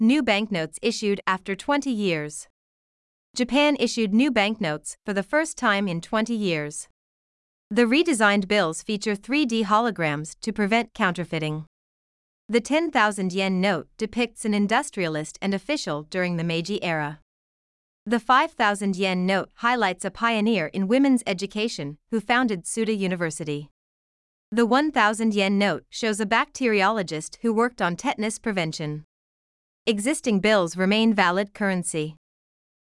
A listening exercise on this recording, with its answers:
現在の英語力を語彙力・文法読解・発音力の点から客観的に測定する作業」です。英語ニュースの音声を聞き、各空欄に入る英文を正確に書き取ってください。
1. Japan ( ) in 20 years.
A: issued new banknotes for the first time

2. The 10,000-yen note ( ) during the Meiji era.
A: depicts an industrialist and official

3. Existing ( ).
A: bills remain valid currency

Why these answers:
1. ▶「banknotes」と「bank notes」を分けて書いてしまった。 ⇒ 「banknotes」は一つの単語として書くのが一般的です。この形で覚えておきましょう。
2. ▶「an industrialist and official」を「an industrialist in official」と書いてしまった。 ⇒ 弱音の機能語「and」と「in」はほぼ同じ音に聞こえるため、正確に聞き取るには中上級レベルの英文読解力が必要です。 今回はこの設問の難易度が最も高く、「industrialist」と「and」を正確に書けていない人が多かったです。
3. ▶「valid(有効な)」という形容詞を知らず、正しく書けなかった。 ⇒ 日常生活でもよく使う語彙なので覚えておきましょう。

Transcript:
New Banknotes Issued After 20 Years
Japan issued new banknotes for the first time in 20 years.
The redesigned bills feature 3D holograms to prevent counterfeiting.
The 10,000-yen note depicts an industrialist and official during the Meiji era.
The 5,000-yen note highlights a pioneer in women's education who founded Tsuda University.
The 1,000-yen note shows a bacteriologist who worked on tetanus prevention.
Existing bills remain valid currency.

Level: 中級脱出